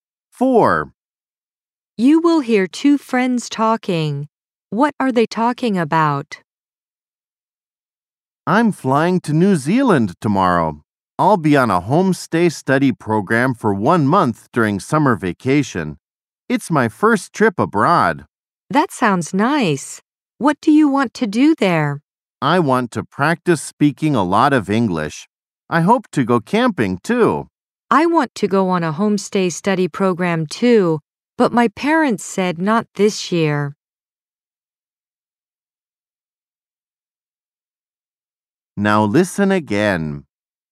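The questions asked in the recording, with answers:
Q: What are they talking about?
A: A homestay study program in New Zealand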